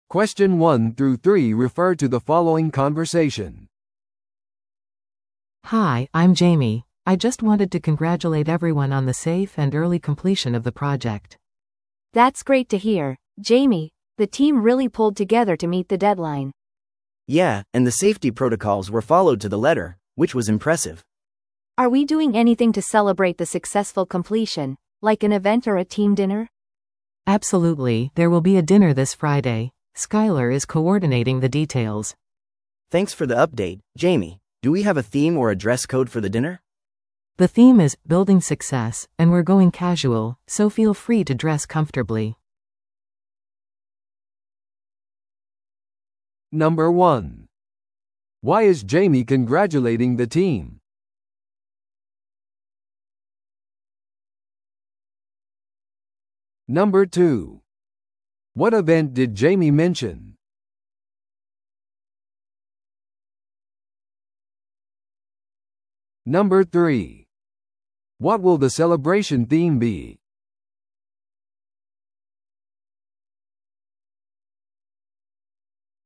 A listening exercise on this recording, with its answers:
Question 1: Why is Jamie congratulating the team?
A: プロジェクトを早期に完了したため。

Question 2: What event did Jamie mention?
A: 祝賀ディナー。

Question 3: What will the celebration theme be?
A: 成功への構築。

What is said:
A: Hi, I'm Jamie. I just wanted to congratulate everyone on the safe and early completion of the project.
B: That's great to hear, Jamie! The team really pulled together to meet the deadline.
C: Yeah, and the safety protocols were followed to the letter, which was impressive.
B: Are we doing anything to celebrate the successful completion, like an event or a team dinner?
A: Absolutely, there will be a dinner this Friday. Skyler is coordinating the details.
C: Thanks for the update, Jamie. Do we have a theme or a dress code for the dinner?
A: The theme is 'Building Success' and we're going casual, so feel free to dress comfortably.